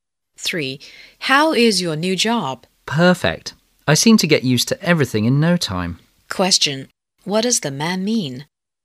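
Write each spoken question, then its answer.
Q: What does the man mean?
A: He got used to the new job quickly and likes it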